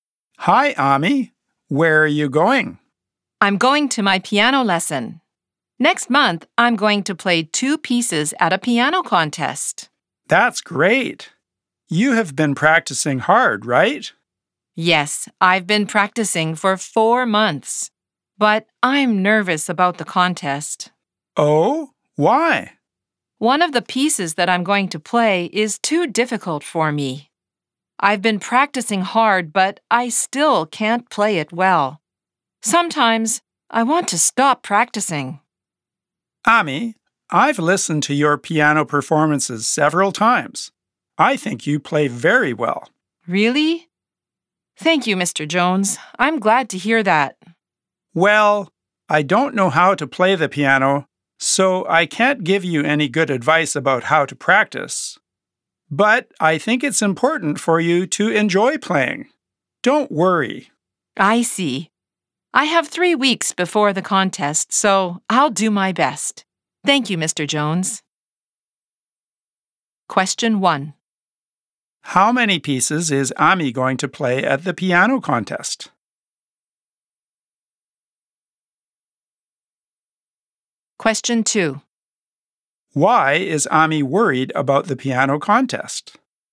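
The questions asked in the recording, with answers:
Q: How many pieces is Ami going to play at the piano contest?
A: Two pieces.

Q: Why is Ami worried about the piano contest?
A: Because one of the pieces is too difficult for her and she still can't play it well.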